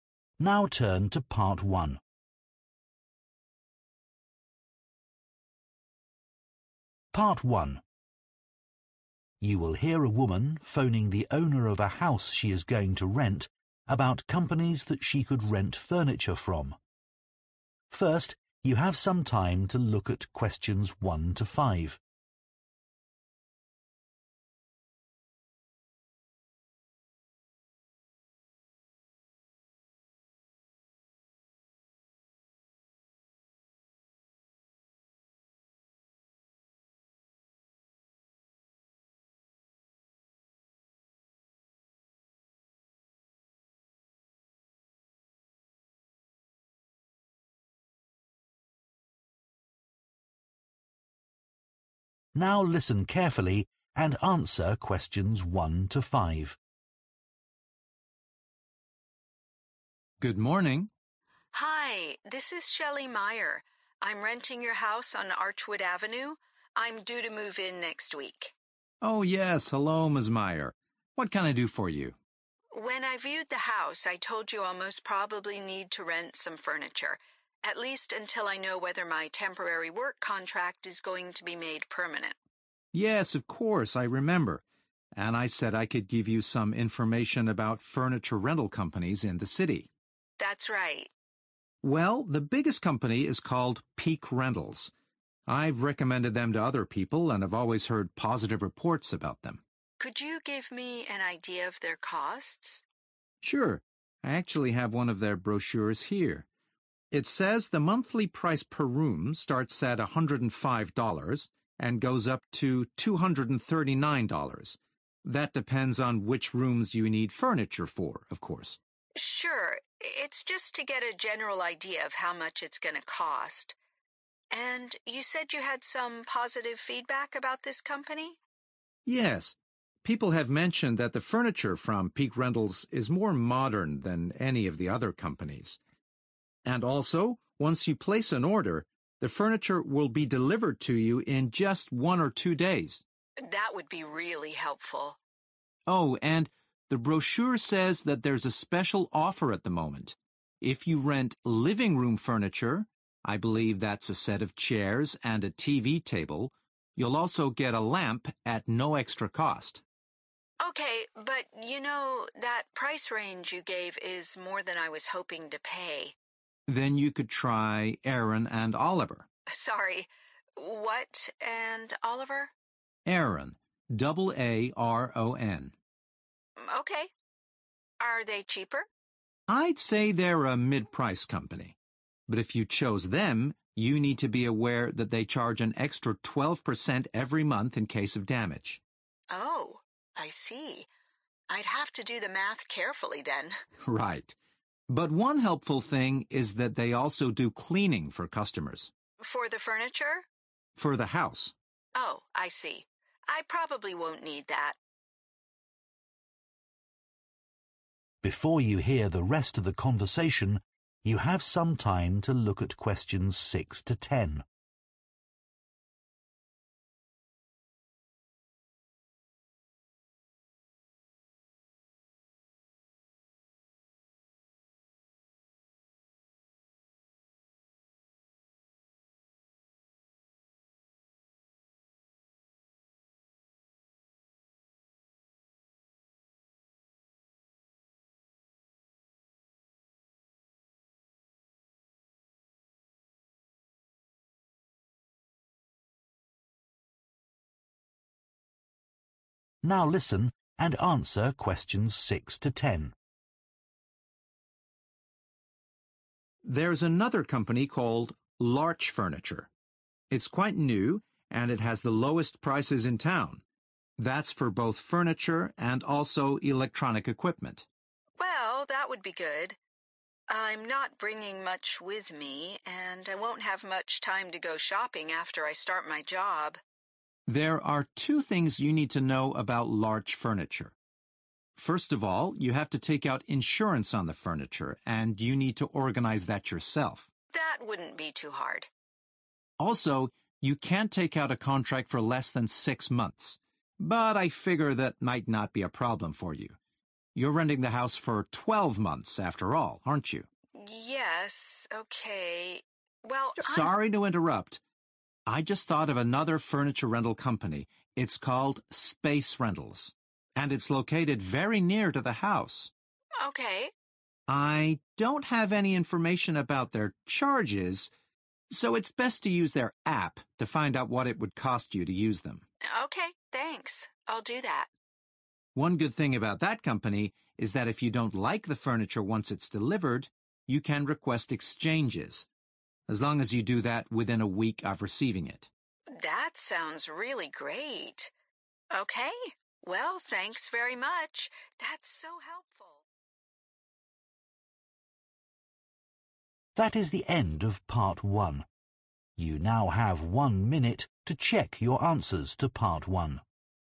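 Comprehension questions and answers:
Complete the table below. Write ONE WORD AND/ OR A NUMBER for each answer.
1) Price ranges from $105 to $ (1) per room per month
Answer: 239

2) The furniture is very (2)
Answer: modern

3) Special offer: Free (3) with every living room set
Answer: lamp

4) (4) And Oliver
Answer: Aaron

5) 12% monthly fee for (5)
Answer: damage

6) Offers cheapest process for renting furniture and (6) items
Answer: electronic

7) Must have own (7)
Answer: insurance

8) (8) Rentals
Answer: Space

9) See the (9) for the most up-to-date prices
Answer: app

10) (10) are allowed within 7 days of delivery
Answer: Exchanges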